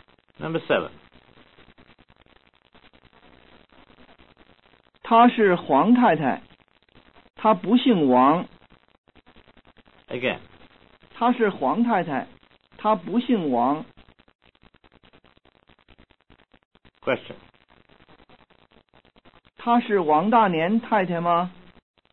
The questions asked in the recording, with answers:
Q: 他是王大年太太吗?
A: 他不是王大年太太,他姓黄。